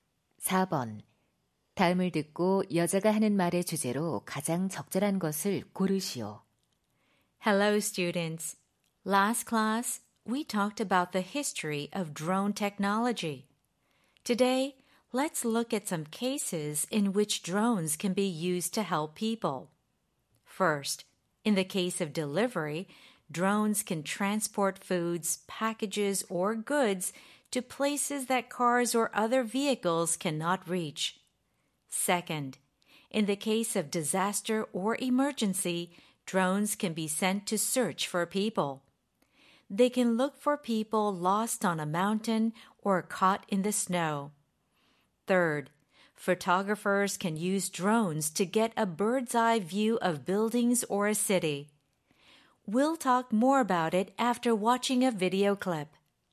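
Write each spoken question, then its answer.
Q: 다음을 듣고 여자가 하는 말의 주제로 가장 적절한 것을 고르시오.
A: 드론을 사람들을 돕는 데 활용하는 사례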